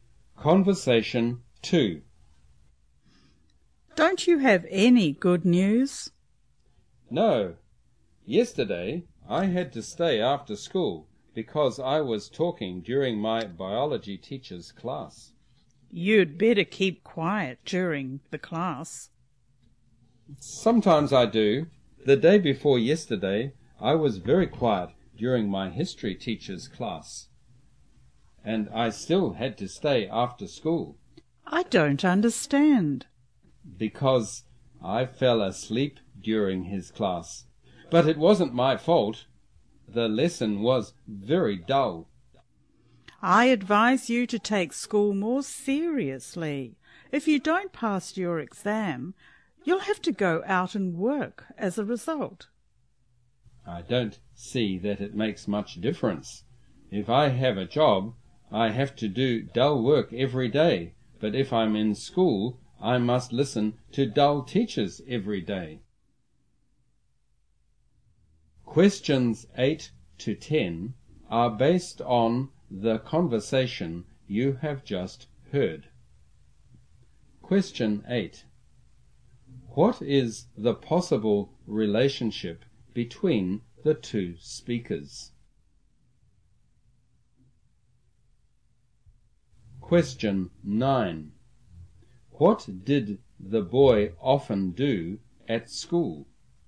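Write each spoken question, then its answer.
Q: What did the boy often do at school?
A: Talked or fell asleep in class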